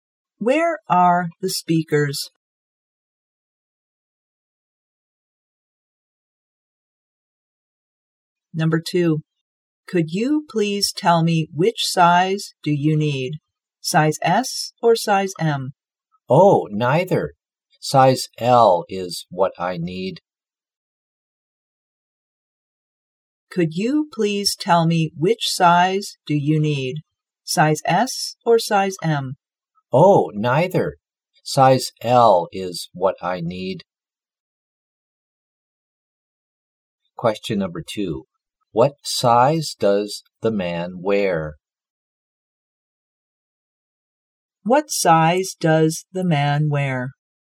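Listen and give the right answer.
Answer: Size L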